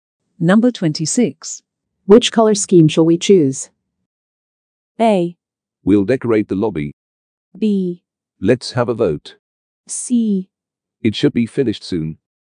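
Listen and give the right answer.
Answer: B: Let's have a vote.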